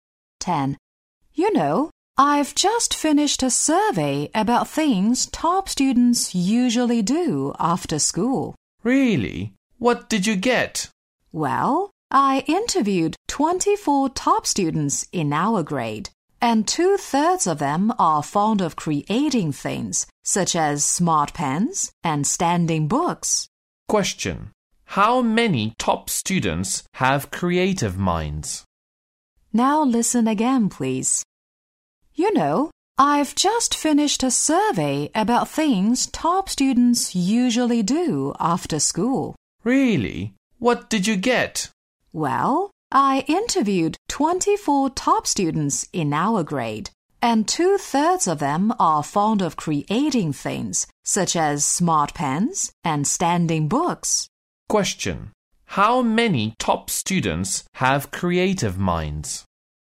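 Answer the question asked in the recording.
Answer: 16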